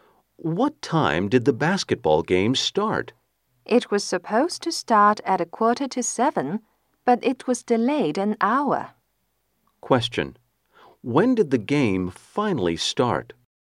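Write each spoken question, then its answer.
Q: When did the game finally start?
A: At 7:45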